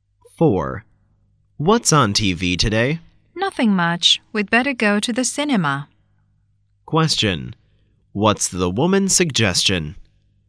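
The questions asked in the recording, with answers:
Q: What's the woman's suggestion?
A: Going to the cinema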